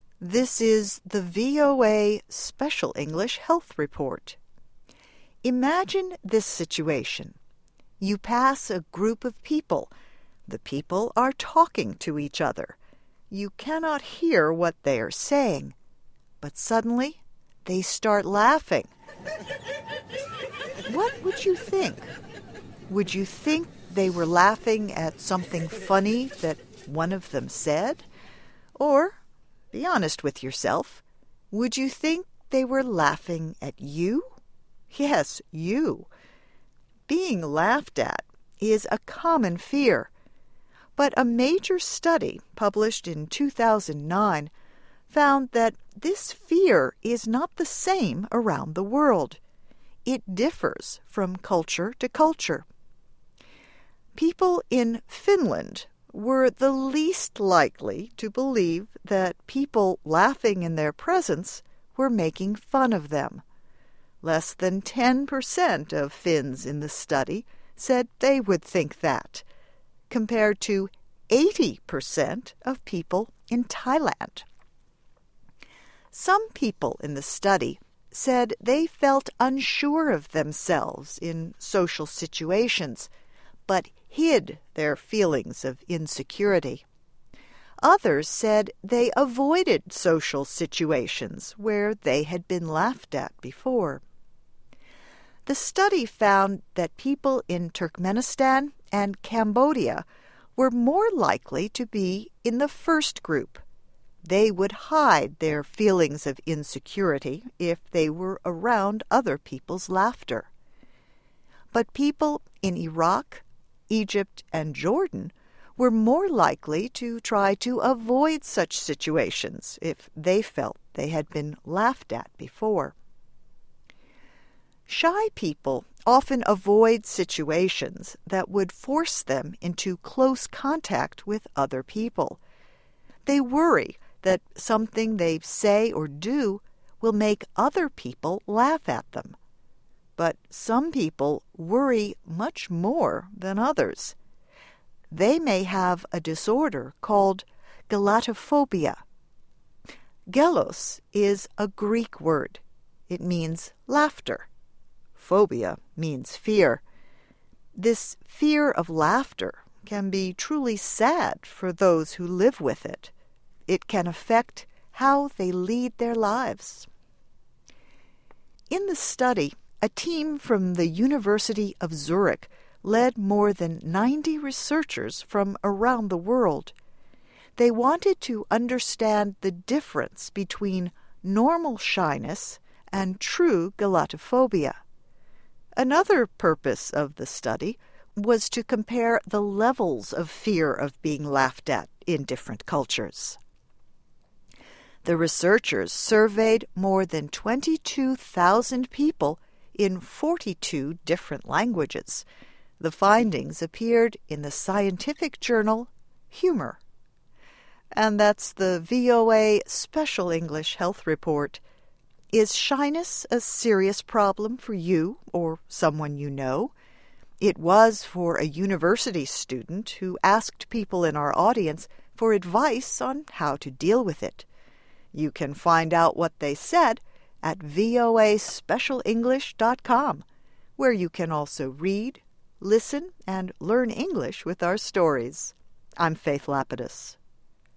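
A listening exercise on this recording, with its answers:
Escucha el audio y completa los recuadros.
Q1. People in Finland were the least likely to believe that people laughing in their presence were making of them.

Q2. Less than percent of Finns in the study said they would think that, compared to percent of people in Thailand.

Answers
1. fun
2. 10; 80

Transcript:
This is the VOA Special English Health Report.
Imagine this situation. You pass a group of people. The people are to each other. You cannot hear what they are saying. But suddenly they start laughing. What would you think? Would you think they were laughing something funny that one of them said? Or -- be honest with yourself -- would you think they were laughing you? Yes, you.
Being laughed at is a common . But a major study published in two thousand nine found that this fear is not the same around the world. It differs from culture to culture.
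Some people in the study said they felt of themselves in social situations but hid their feelings of insecurity. Others said they avoided social situations where they had been laughed at before.
The study found that people in Turkmenistan and Cambodia were more likely to be in the first group. They would hide their feelings of if they were around other people's laughter. But people in Iraq, Egypt and Jordan were more likely to try to avoid such situations if they felt they had been laughed at before.
Shy people often avoid situations that would force them into close with other people. They worry that something they say or do will make other people laugh at them. But some people worry much more than others. They may have a called gelotophobia. Gelos is a Greek word. It means laughter. Phobia means fear. This fear of laughter can be truly sad for those who live with it. It can affect how they lead their lives.
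In the study, a team from the University of Zurich led more than researchers from around the world. They wanted to understand the difference between normal shyness and true gelotophobia. Another purpose of the study was to compare the levels of fear of being laughed at in different cultures. The researchers surveyed more than twenty-two thousand people in different languages. The findings appeared in the scientific journal Humor.
Is shyness a serious problem for you or someone you know? It was for a university student who asked people in our audience for advice on how to deal with it. You can find out what they said at voaspecialenglish.com -- where you can also read, listen and learn English with our stories. I'm Faith Lapidus.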